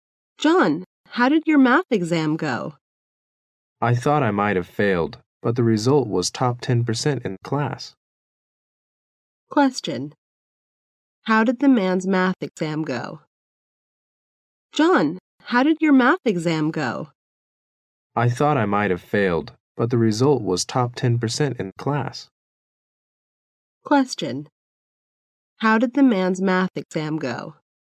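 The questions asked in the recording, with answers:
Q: How did the man's math exam go?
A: Very well; he was in the top 10% of the class.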